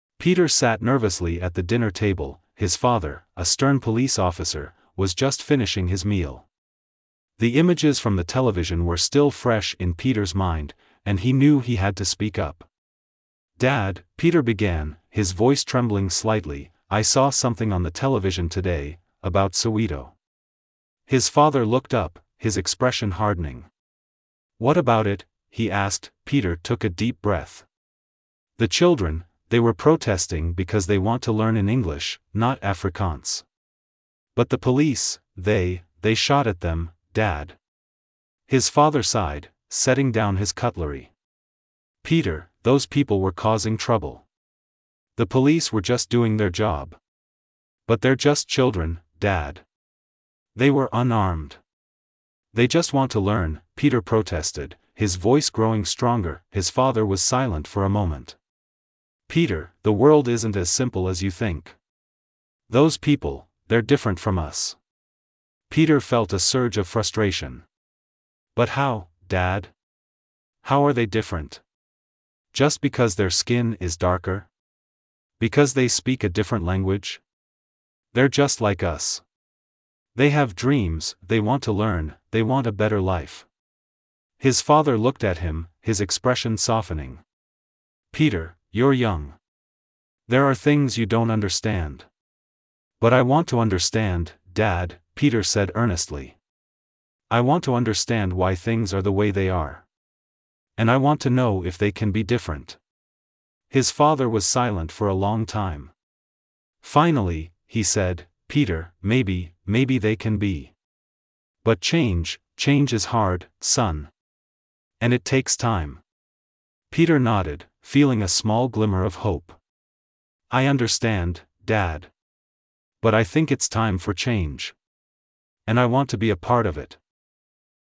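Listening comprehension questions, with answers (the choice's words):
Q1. What issue is being discussed in the conversation between Pieter and his father?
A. The benefits of new technology in education.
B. A protest that took place in Soweto.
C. A recent sports event.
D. The opening of a new restaurant.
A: A protest that took place in Soweto.

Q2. How does Pieter's father view the actions of the police?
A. He strongly criticizes them.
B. He believes they were unnecessary.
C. He supports them as necessary for maintaining order.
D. He has no opinion on the matter.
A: He supports them as necessary for maintaining order.

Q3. What emotion does Pieter most likely feel during the conversation?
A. Joy.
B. Indifference.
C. Frustration.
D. Excitement.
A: Frustration.

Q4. According to the dialogue, what is Pieter's father's profession?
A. A teacher.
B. A police officer.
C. A journalist.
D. A doctor.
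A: A police officer.

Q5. What is the main conflict in the conversation?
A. Disagreement on a family matter.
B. Different views on the societal issue discussed.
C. Planning a holiday trip.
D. Choosing a restaurant for dinner.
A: Different views on the societal issue discussed.

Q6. What is the main topic of the conversation between Pieter and his father?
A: The police shooting at children protesting in Soweto

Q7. Where does the conversation take place?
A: At the dinner table

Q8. What specific event do Pieter and his father discuss?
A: Children protesting in Soweto to learn in English, not Afrikaans, were shot at by police

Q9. How does Pieter feel about the event?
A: Frustrated; he thinks it was wrong

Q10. What is Pieter's father's profession?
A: Police officer

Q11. What solution or opinion does Pieter's father offer regarding the event?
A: The police were just doing their job; change may be possible but is hard and takes time

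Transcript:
Pieter sat nervously at the dinner table, his father, a stern police officer, was just finishing his meal. The images from the television were still fresh in Pieter's mind, and he knew he had to speak up.
"Dad," Pieter began, his voice trembling slightly, "I saw something on the television today...
His father looked up, his expression hardening. "What about it?" he asked.
Pieter took a deep breath. "The children... they were protesting because they want to learn in English, not Afrikaans. But the police... they... they shot at them, Dad."
His father sighed, setting down his cutlery. "Pieter, those people were causing trouble. The police were just doing their job."
"But they're just children, Dad. They were unarmed. They just want to learn," Pieter protested, his voice growing stronger.
His father was silent for a moment. "Pieter, the world isn't as simple as you think. Those people... 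they're different from us."
Pieter felt a surge of frustration. "But how, Dad? How are they different? Just because their skin is darker? Because they speak a different language? They're just like us. They have dreams, they want to learn, they want a better life."
His father looked at him, his expression softening. "Pieter, you're young. There are things you don't understand."
"But I want to understand, Dad," Pieter said earnestly. "I want to understand why things are the way they are. And I want to know if they can be different."
maybe they can be. But change... change is hard, son. And it takes time."
Pieter nodded, feeling a small glimmer of hope. "I understand, Dad. But I think it's time for change. And I want to be a part of it."

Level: B1 Niveau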